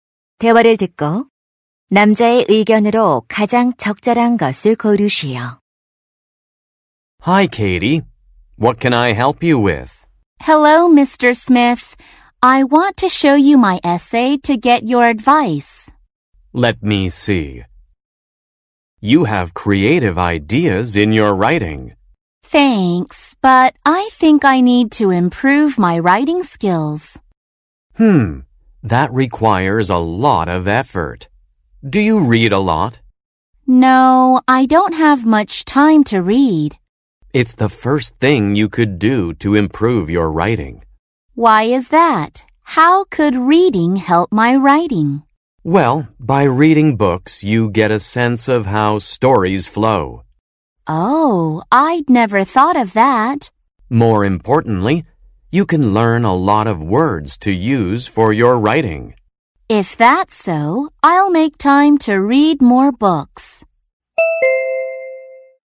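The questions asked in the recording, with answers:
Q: 대화를 듣고 남자의 의견으로 가장 적절한 것을 고르시오.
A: 독서는 글쓰기 실력 향상에 도움이 된다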